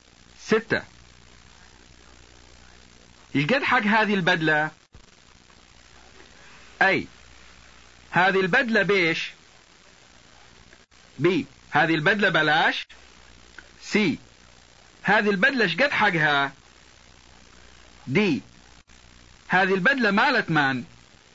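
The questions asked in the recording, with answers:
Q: يقد حق هذه البدلة.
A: C: هذه البدلة شقد حقها.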